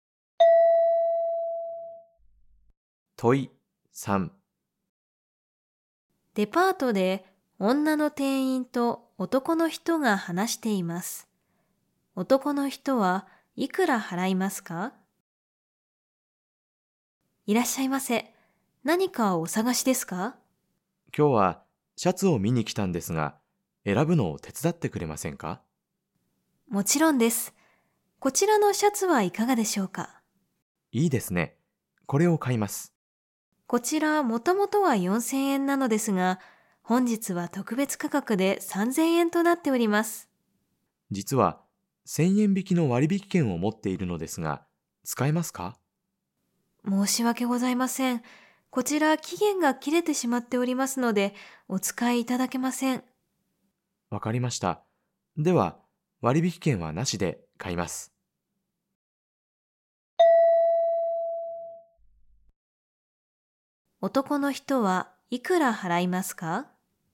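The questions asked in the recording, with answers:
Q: 男の人はいくら払いますか?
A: 3000円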